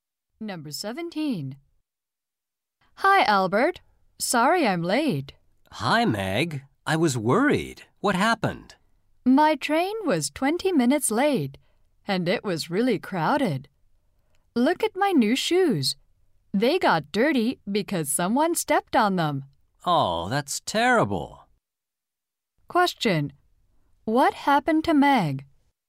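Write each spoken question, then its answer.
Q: What happened to Meg?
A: Her train was late and her new shoes got dirty.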